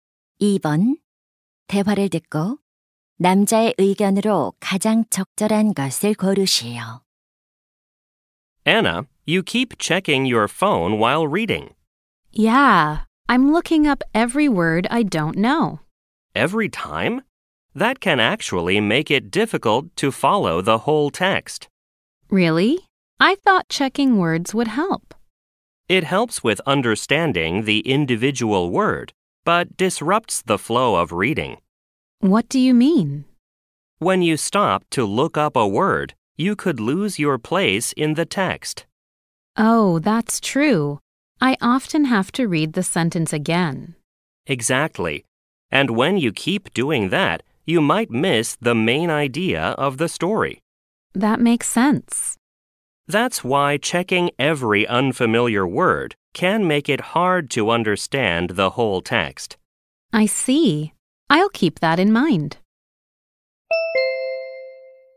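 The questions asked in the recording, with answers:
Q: 대화를 듣고 남자의 의견으로 가장 적절한 것을 고르시오.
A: 모르는 단어를 매번 찾아보면 글 전체를 이해하기 어려울 수 있다.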